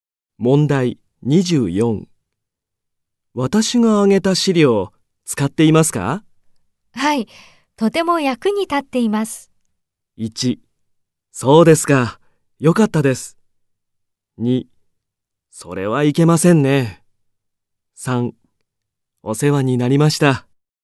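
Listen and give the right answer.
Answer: 1: そうですか、よかったです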